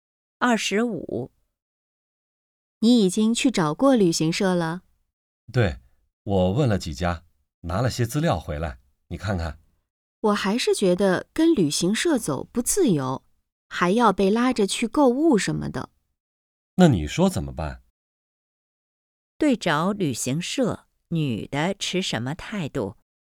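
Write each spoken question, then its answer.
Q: 对找旅行社,女的持什么态度?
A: 不赞成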